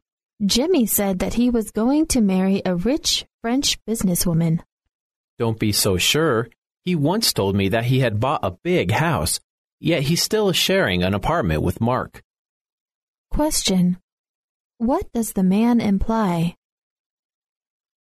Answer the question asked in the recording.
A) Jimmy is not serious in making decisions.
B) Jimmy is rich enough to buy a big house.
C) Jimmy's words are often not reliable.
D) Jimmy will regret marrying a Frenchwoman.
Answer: C) Jimmy's words are often not reliable.

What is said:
[听力原文] W: Jimmy said that he was going to marry a rich French businesswoman. M: Don't be so sure. He once told me that he had bought a big house. Yet he's still sharing an apartment with Mark. Q: What does the man imply?